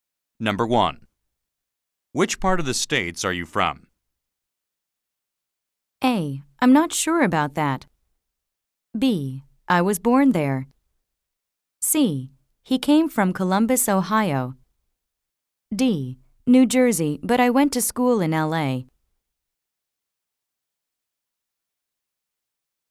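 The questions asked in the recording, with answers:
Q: Which part of the states are you from?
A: D: New Jersey, but I went to school in L.A.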